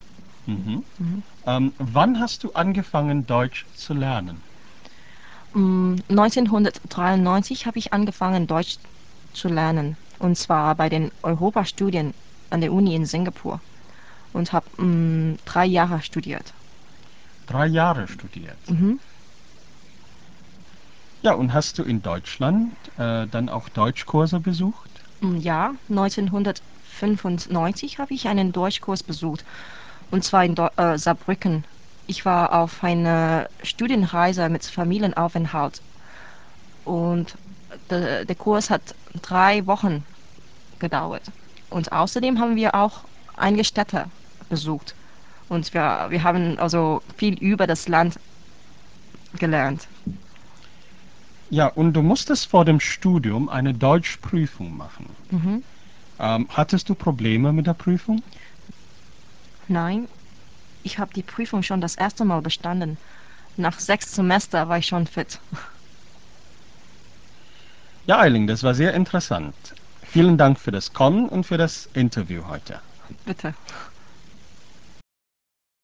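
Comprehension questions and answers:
Sie hören ein Interview mit einer singapurischen Studentin in 3 Abschnitten. Hören Sie jeden Abschnitt und clicken Sie dann rechts die richtige Antwort an. Im Hörtext finden Sie viele Verben im Perfekt oder Präteritum.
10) Sie hat in Singapur Europastudien studiert, aber Deutsch erst in Deutschland gelernt.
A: Falsch

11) 1994 war sie auf einer Studienreise in Deutschland.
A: Falsch

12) Sie hat in Saarbrücken einen Deutschkurs besucht.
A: Richtig

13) Sie mußte ihre Deutschprüfung in Heidelberg zweimal machen.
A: Falsch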